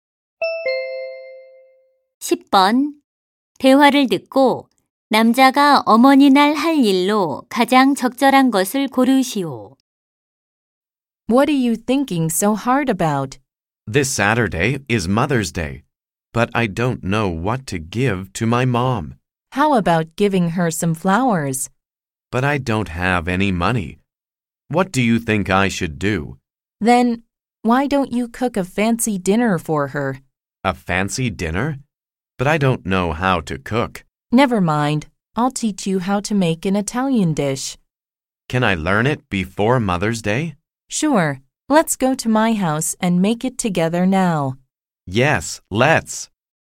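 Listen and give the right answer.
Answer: 어머니께 이탈리아 요리로 저녁 만들어 드리기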